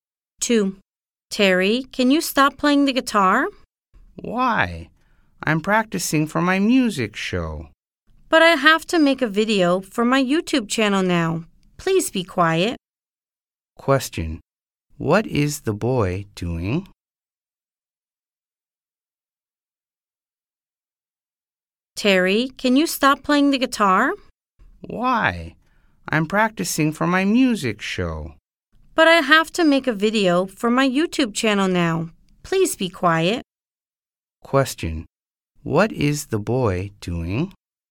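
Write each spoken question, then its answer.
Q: What is the boy doing?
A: Playing the guitar (practicing for his music show)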